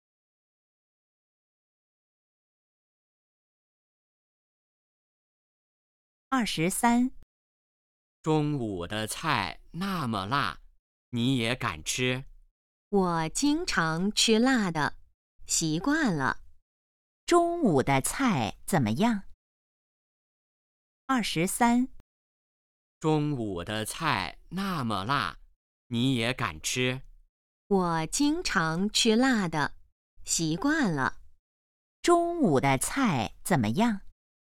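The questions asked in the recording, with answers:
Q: 中午的菜怎么样?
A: 很辣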